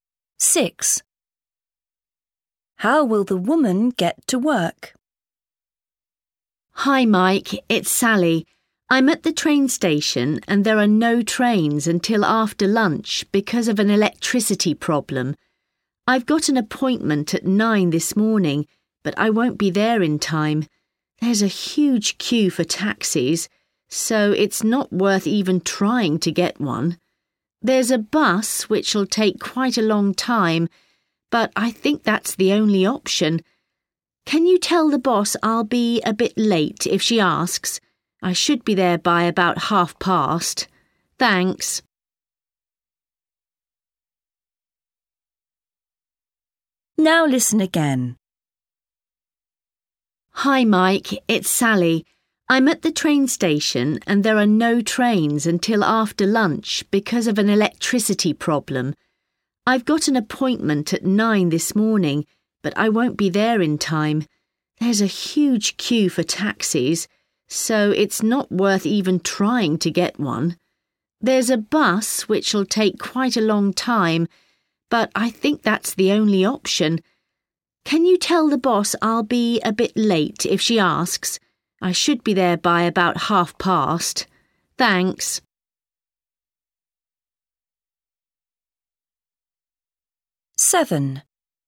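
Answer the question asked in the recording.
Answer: by bus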